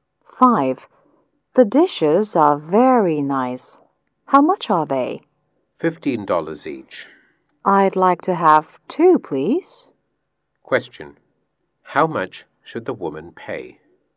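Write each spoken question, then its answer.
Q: How much should the woman pay?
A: $30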